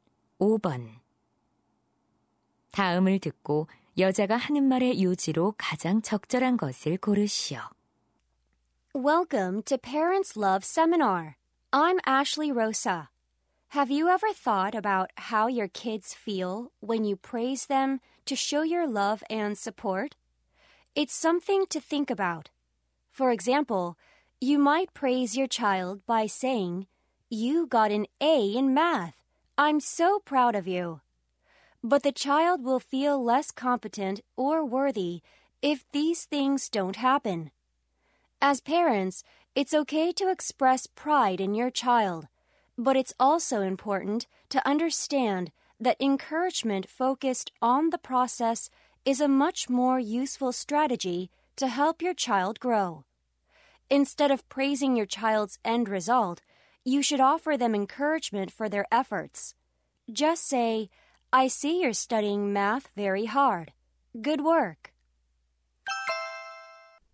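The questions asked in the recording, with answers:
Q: 다음을 듣고 여자가 하는 말의 요지로 가장 적절한 것을 고르시오.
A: 아이의 결과보다 노력하는 과정을 격려해야 한다.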